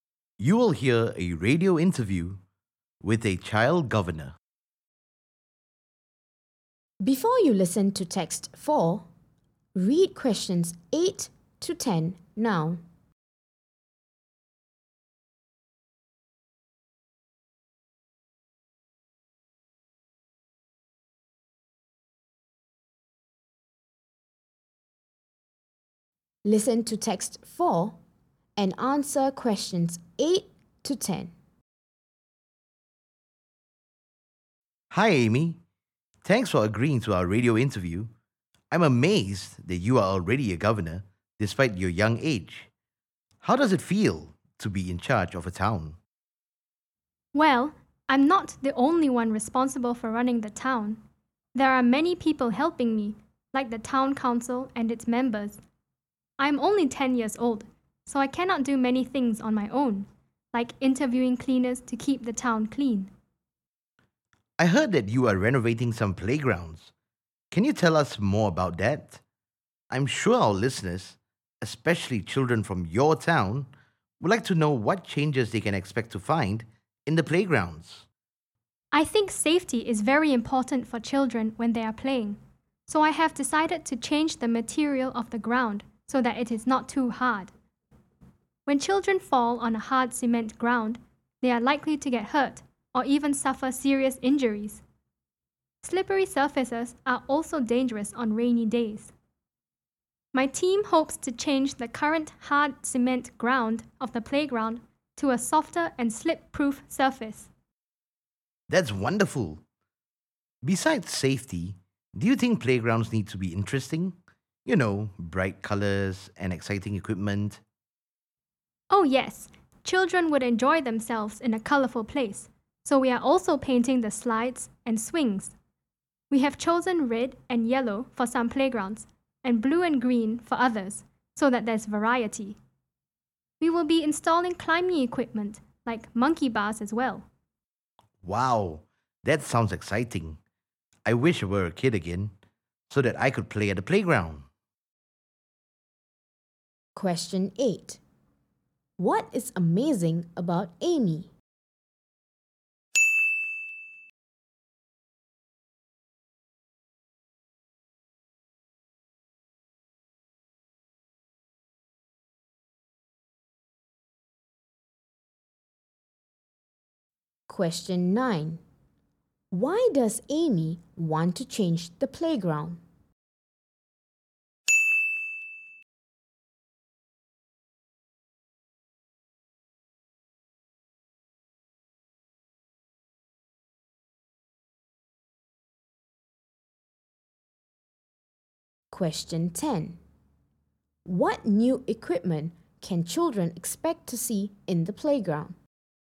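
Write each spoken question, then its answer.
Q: What is amazing about Amy?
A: She is already a governor at only 10 years old.

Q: Why does Amy want to change the playground?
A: For safety: the hard cement ground can cause injuries and is slippery.

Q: What new equipment can children expect to see in the playground?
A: Climbing equipment like monkey bars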